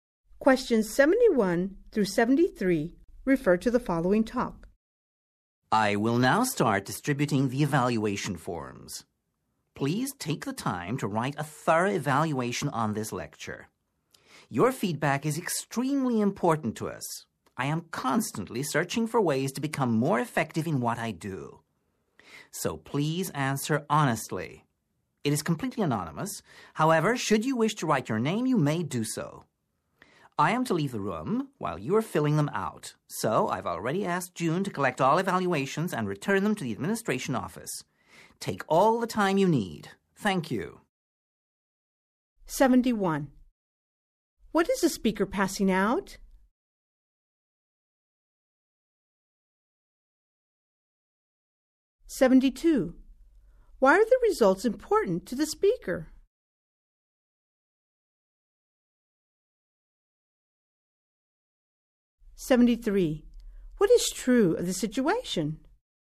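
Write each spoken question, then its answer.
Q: What is the speaker passing out?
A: Evaluation forms

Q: Why are the results important to the speaker?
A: The speaker wants to become more effective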